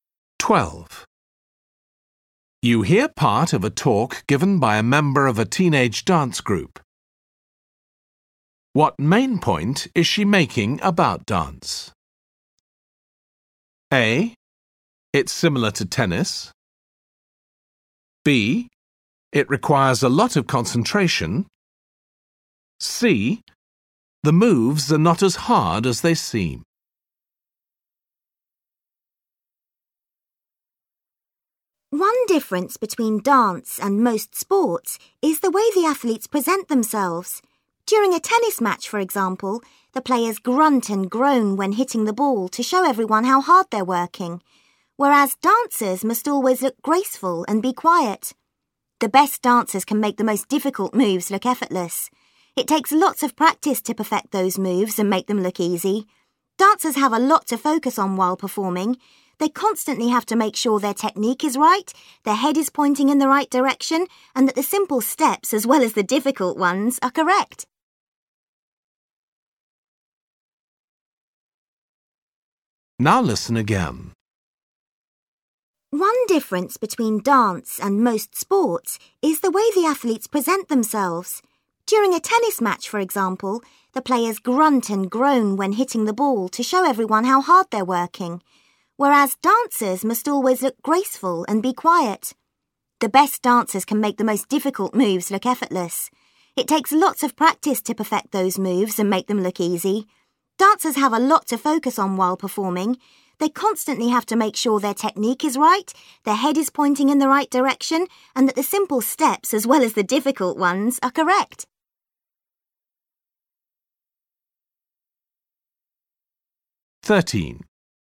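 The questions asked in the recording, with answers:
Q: What main point is she making about dance?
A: B: It requires a lot of concentration.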